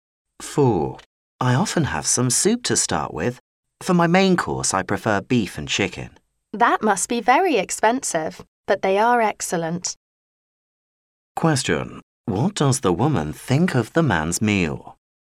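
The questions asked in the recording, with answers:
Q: What does the woman think of the man's meal?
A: Expensive but excellent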